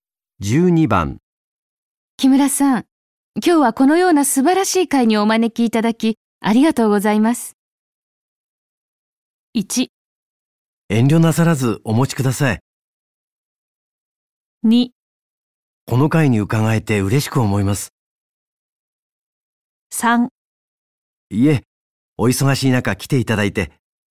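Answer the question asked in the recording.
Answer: 3: いえ、お忙しい中来ていただいて。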